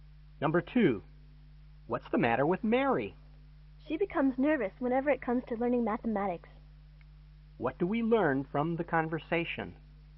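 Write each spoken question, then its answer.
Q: What do we learn from the conversation?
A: Mary gets nervous about learning math.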